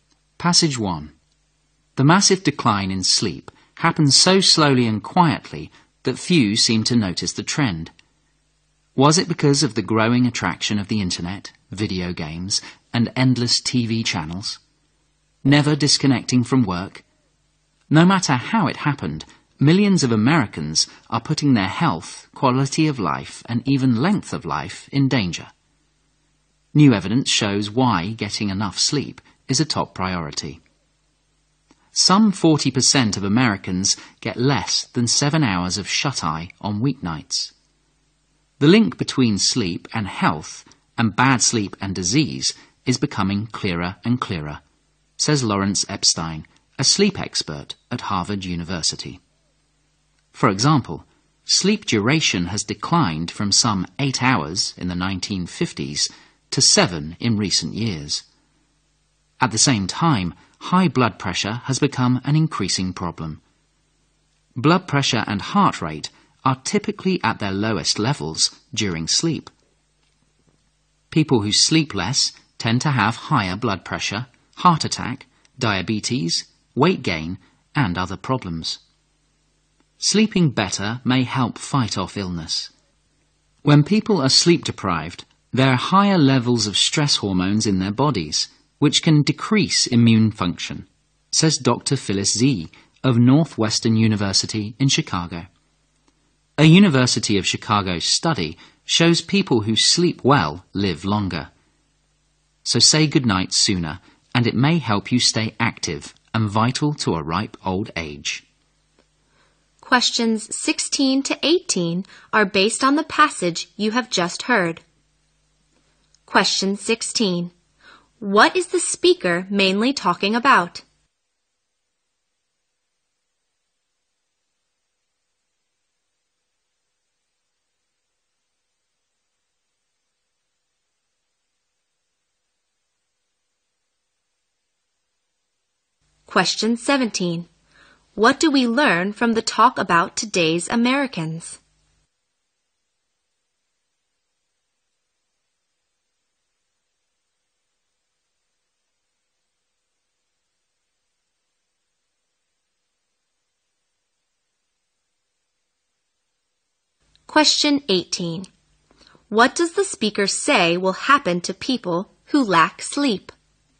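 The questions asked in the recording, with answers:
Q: What is the speaker mainly talking about?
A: The importance of getting enough sleep.

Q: What do we learn from the talk about today's Americans?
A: Many of them get less sleep than they need.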